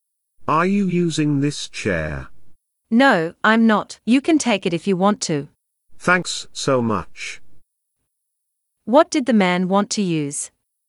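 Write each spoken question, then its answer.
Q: What did the man want to use?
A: A chair.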